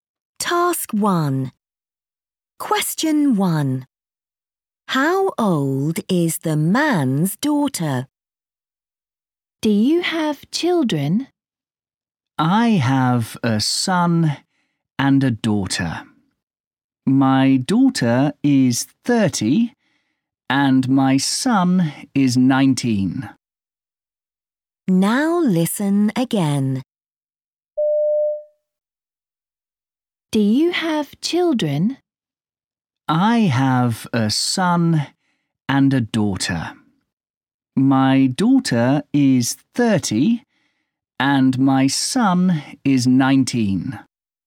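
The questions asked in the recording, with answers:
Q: How old is the man's daughter?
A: 30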